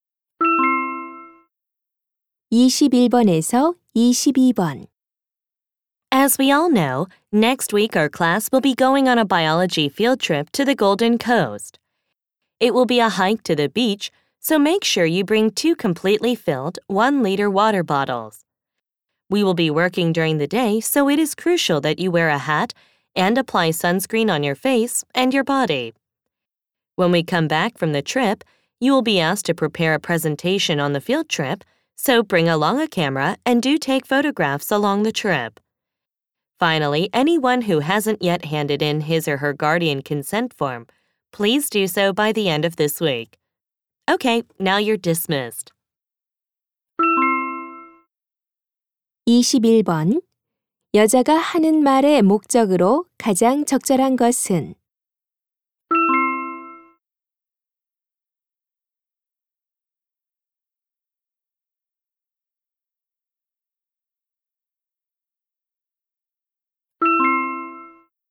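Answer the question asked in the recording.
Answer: 현장 학습 준비 사항을 안내하려고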